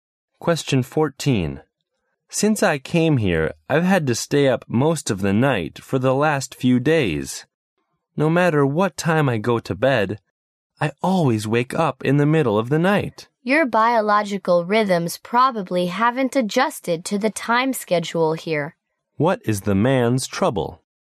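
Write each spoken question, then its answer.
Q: What is the man's trouble?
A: He can't sleep through the night; his body hasn't adjusted to the new time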